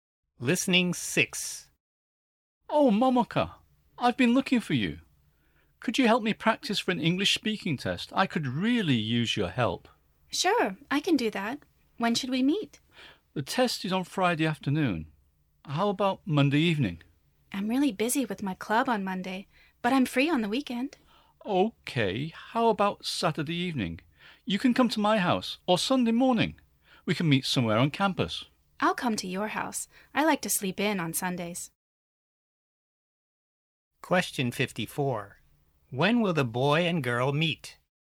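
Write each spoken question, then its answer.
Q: When will the boy and girl meet?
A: Saturday evening (at the boy's house)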